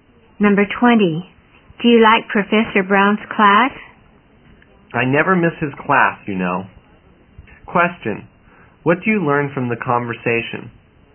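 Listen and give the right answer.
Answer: The speaker likes Professor Brown's class very much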